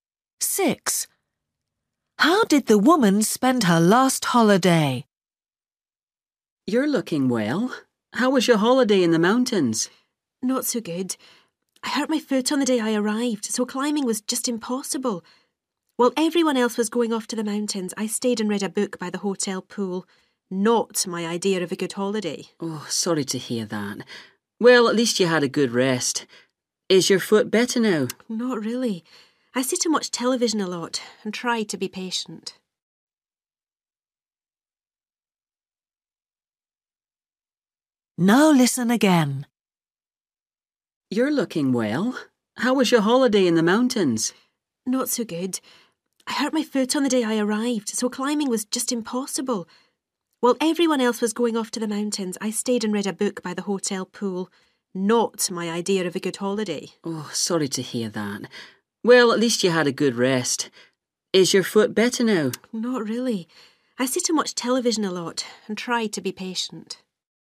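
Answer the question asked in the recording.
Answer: reading a book by the hotel pool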